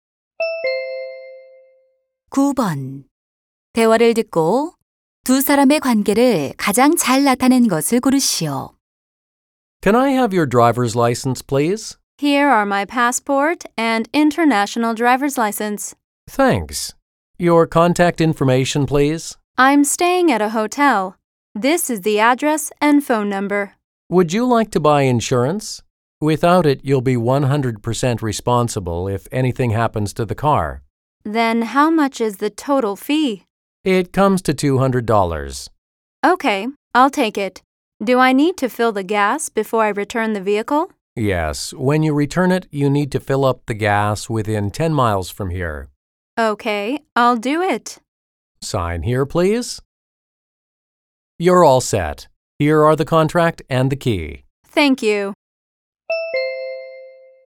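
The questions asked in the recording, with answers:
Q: 대화를 듣고 두 사람의 관계를 가장 잘 나타낸 것을 고르시오.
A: 렌터카 직원 - 고객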